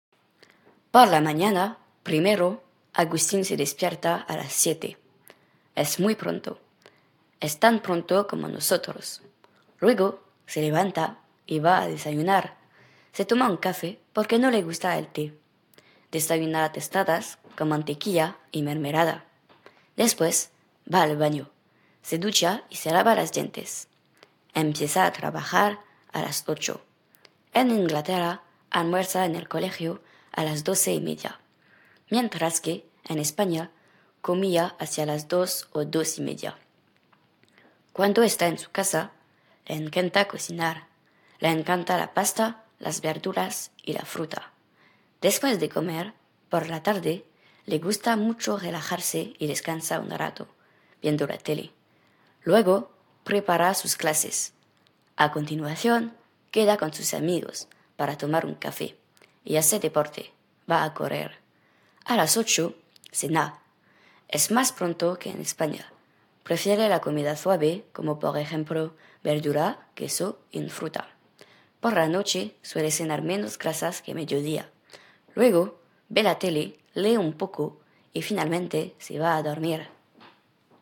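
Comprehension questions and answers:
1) Por la mañana, primero, Agustín___________________ a las__________________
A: se despierta; 7

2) Es muy ___________________ (≠ tarde)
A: pronto

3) Es _______ pronto _________ nosotros.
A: tan; como

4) Luego, se levanta y va a ______________________ (= comer por la mañana)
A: desayunar

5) Se toma un_______________ porque no le gusta el _________________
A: café; té

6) Desayuna ___________________ con mantequilla y mermelada.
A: tostadas

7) Después, va al ________________________, se ducha y se lava los dientes.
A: baño

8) Empieza a trabajar a__________________________.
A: las 8

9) Cuando está en su casa, le encanta ____________, le encantan la pasta, las ___________y la fruta.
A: cocinar; verduras

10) Después de comer, por la tarde, le gusta mucho_____________ y descansa un rato (= un momento)____________ (en regardant) la tele.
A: relajarse; viendo

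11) Luego, prepara sus clases. A continuación, ___________con sus amigos para tomar un café y hace deporte: va a ______________.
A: queda; correr

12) A las __________________, ___________________ (= comer por la noche).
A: 8; cena

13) Es __________ pronto _________ en España.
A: más; que

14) Por la noche, suele cenar___________ grasas __________ a mediodía.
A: menos; que

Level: 4ème BIL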